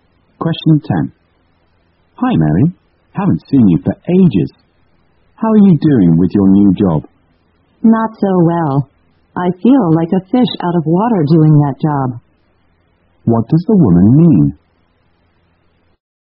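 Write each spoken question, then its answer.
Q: What does the woman mean?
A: She feels uncomfortable and out of place in her new job.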